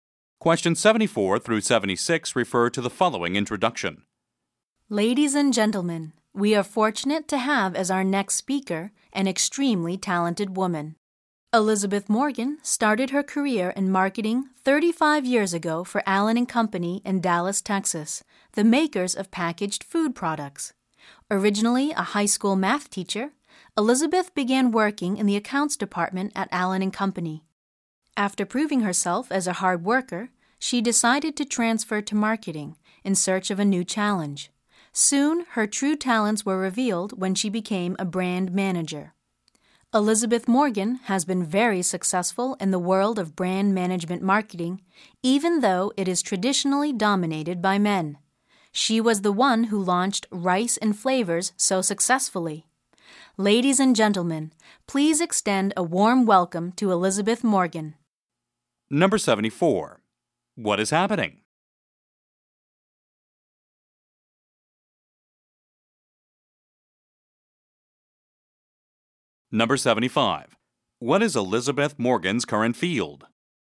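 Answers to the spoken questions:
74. A speaker is being introduced
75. Brand management marketing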